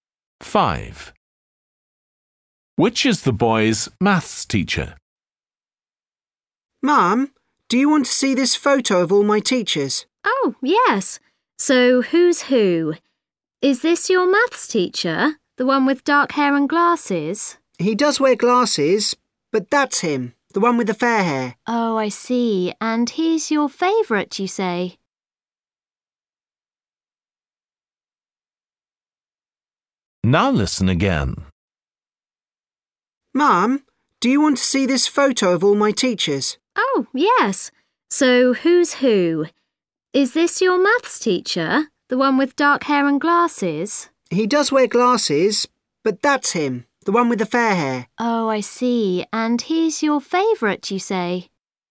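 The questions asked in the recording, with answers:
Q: Which is the boy's maths teacher?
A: the one with fair hair and glasses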